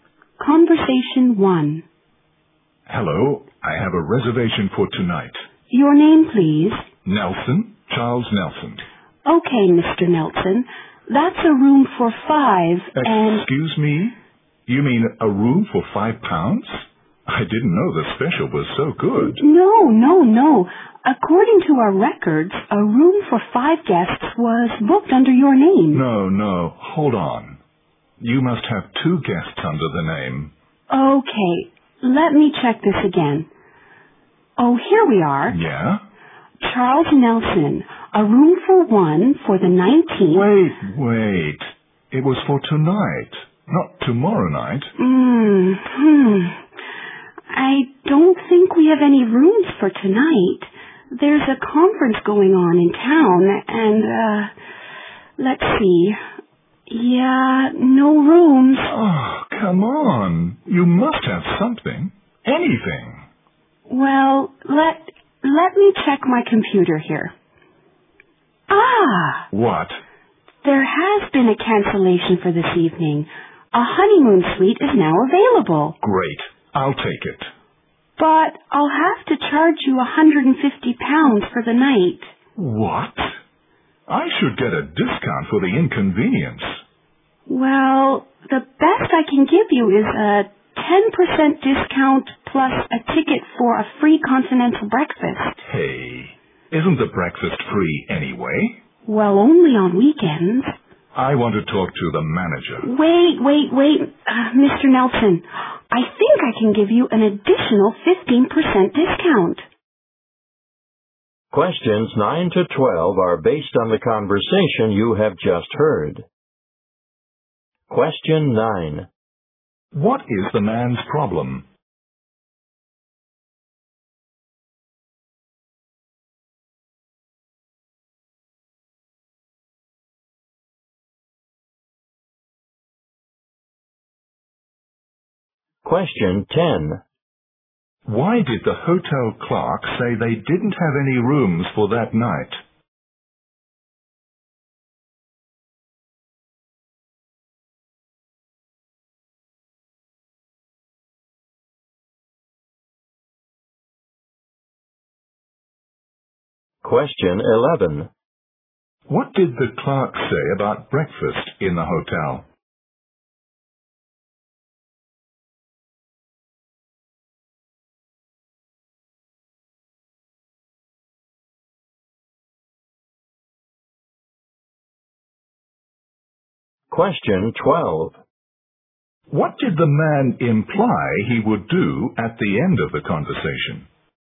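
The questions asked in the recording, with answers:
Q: What is the man's problem?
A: His reservation was recorded for the wrong date

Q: Why did the hotel clerk say they didn't have any rooms for that night?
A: A conference was going on in town

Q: What did the clerk say about breakfast in the hotel?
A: It is free only on weekends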